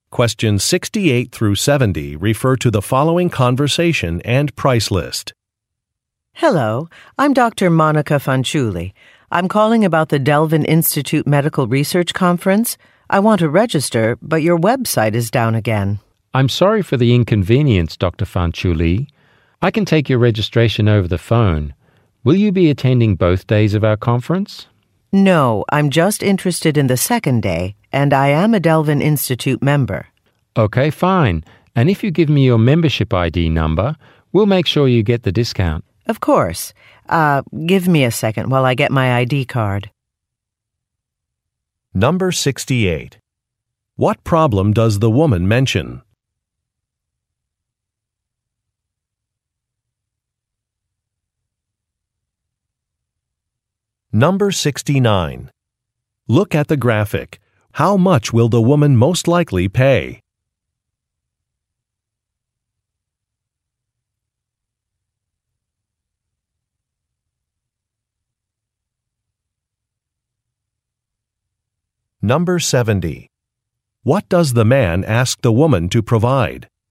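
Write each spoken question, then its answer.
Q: What problem does the woman mention?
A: The website is not working.

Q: What does the man ask the woman to provide?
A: Her membership ID number.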